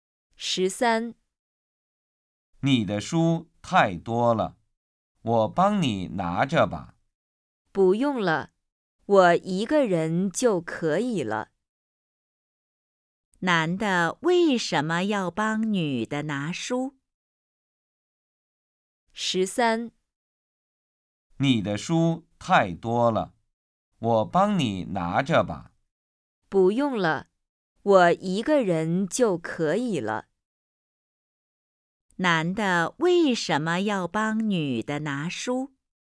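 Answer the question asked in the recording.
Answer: 因为女的书太多了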